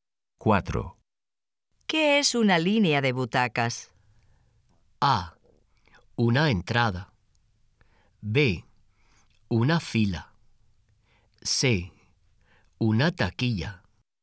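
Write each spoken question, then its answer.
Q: ¿Qué es una línea de butacas?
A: B: Una fila.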